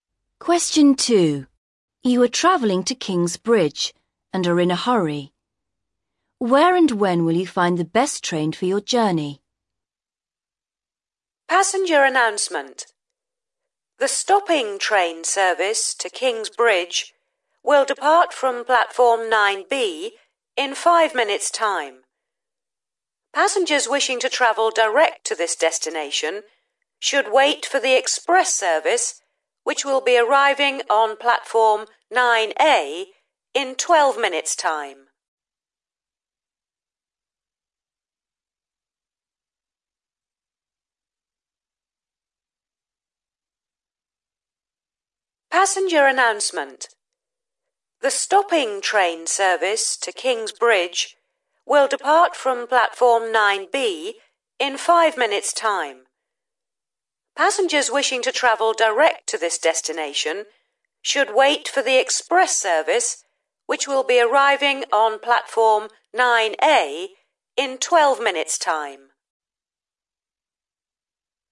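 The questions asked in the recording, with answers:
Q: Where and when will you find the best train for your journey?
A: Platform 9A in 12 minutes' time (the express)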